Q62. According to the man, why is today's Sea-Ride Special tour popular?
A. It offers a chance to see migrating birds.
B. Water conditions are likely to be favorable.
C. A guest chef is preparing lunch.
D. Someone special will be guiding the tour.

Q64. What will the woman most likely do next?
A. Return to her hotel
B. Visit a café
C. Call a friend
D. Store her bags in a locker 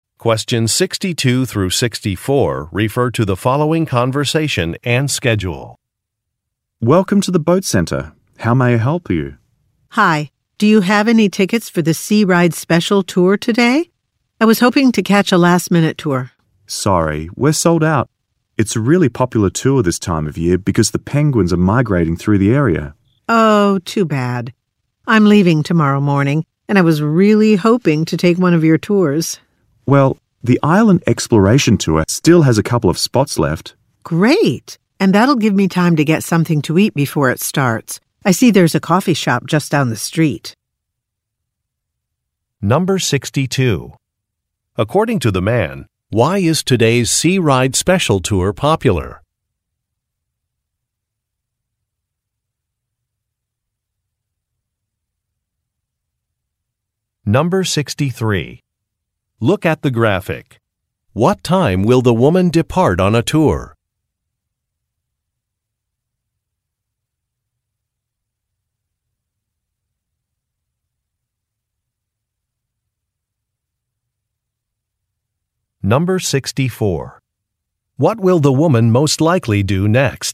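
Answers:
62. A
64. B

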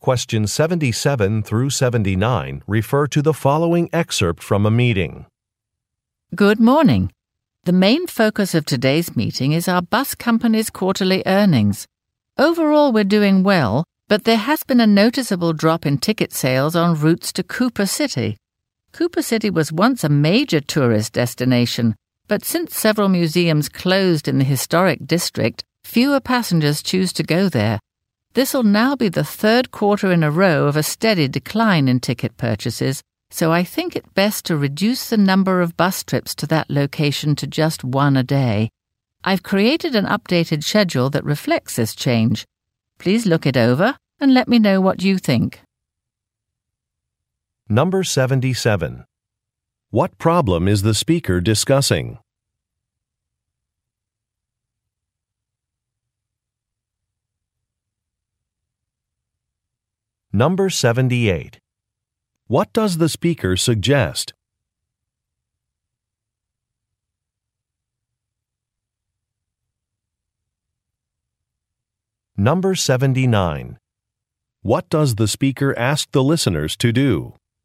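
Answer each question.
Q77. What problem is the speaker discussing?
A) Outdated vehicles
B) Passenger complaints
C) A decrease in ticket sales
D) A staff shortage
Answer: C

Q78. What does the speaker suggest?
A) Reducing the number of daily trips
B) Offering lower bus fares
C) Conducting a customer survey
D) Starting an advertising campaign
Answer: A

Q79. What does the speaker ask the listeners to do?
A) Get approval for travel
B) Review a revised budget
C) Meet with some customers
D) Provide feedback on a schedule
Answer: D

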